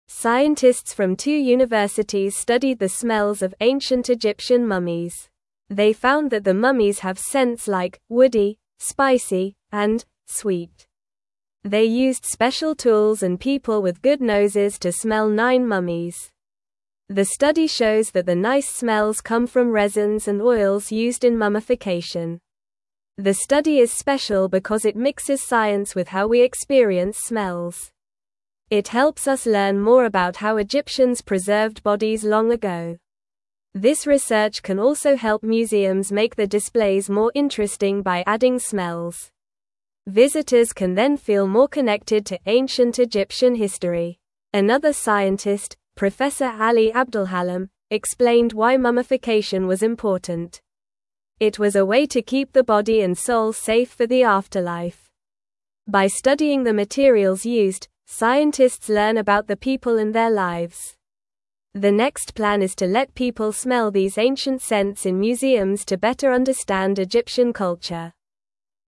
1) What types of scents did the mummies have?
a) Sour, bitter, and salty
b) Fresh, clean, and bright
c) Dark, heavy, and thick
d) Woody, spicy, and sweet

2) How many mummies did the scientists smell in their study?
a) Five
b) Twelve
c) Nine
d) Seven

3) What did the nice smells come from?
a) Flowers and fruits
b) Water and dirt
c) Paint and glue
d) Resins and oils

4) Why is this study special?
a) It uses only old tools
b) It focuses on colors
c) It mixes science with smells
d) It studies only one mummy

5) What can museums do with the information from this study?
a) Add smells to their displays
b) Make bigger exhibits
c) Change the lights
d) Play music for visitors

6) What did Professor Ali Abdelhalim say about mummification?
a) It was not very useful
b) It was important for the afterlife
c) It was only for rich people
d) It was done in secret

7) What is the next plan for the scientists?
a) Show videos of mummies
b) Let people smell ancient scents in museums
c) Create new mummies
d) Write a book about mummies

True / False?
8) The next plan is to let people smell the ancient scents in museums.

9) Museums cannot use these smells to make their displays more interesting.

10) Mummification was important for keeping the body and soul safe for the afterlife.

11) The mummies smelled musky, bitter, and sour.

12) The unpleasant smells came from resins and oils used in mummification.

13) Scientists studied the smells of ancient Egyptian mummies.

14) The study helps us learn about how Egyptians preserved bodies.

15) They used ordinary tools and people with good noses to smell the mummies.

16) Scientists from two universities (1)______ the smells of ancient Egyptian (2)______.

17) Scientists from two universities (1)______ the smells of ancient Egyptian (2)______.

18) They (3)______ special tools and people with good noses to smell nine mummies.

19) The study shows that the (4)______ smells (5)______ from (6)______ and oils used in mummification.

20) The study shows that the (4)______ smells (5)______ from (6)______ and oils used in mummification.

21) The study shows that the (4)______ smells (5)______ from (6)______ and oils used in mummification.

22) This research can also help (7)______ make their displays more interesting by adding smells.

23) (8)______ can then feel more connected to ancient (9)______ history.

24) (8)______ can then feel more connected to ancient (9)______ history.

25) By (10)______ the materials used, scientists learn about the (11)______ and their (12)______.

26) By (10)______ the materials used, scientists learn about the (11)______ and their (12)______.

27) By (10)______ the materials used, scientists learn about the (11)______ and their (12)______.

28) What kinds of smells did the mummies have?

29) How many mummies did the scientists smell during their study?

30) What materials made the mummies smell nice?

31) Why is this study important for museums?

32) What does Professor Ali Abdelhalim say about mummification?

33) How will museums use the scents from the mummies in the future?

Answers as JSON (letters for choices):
{"1": "d", "2": "c", "3": "d", "4": "c", "5": "a", "6": "b", "7": "b", "8": "True", "9": "False", "10": "True", "11": "False", "12": "False", "13": "True", "14": "True", "15": "False", "16": "studied", "17": "mummies", "18": "used", "19": "nice", "20": "come", "21": "resins", "22": "museums", "23": "Visitors", "24": "Egyptian", "25": "studying", "26": "people", "27": "lives", "28": "The mummies had smells like \"woody,\" \"spicy,\" and \"sweet.\"", "29": "The scientists smelled nine mummies during their study.", "30": "The nice smells came from resins and oils used in mummification.", "31": "This study is important for museums because it can make their displays more interesting by adding smells.", "32": "Professor Ali Abdelhalim says that mummification was important to keep the body and soul safe for the afterlife.", "33": "Museums will let people smell these ancient scents to help them understand Egyptian culture better."}

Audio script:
Scientists from two universities studied the smells of ancient Egyptian mummies. They found that the mummies have scents like "woody," "spicy," and "sweet." They used special tools and people with good noses to smell nine mummies. The study shows that the nice smells come from resins and oils used in mummification.
The study is special because it mixes science with how we experience smells. It helps us learn more about how Egyptians preserved bodies long ago. This research can also help museums make their displays more interesting by adding smells. Visitors can then feel more connected to ancient Egyptian history.
Another scientist, Professor Ali Abdelhalim, explained why mummification was important. It was a way to keep the body and soul safe for the afterlife. By studying the materials used, scientists learn about the people and their lives. The next plan is to let people smell these ancient scents in museums to better understand Egyptian culture.

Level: Level 2